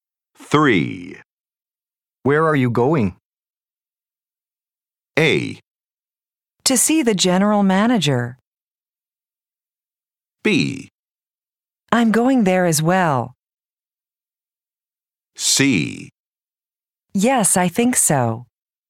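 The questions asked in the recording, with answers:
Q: Where are you going?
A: A: To see the general manager.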